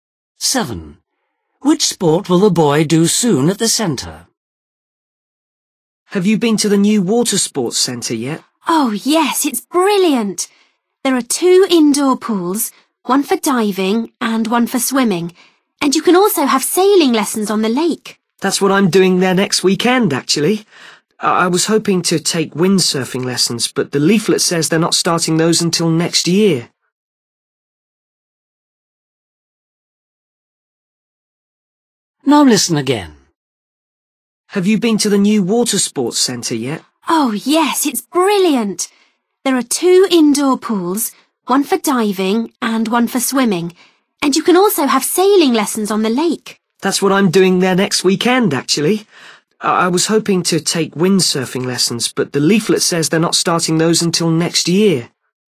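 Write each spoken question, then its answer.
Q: Which sport will the boy do soon at the centre?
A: sailing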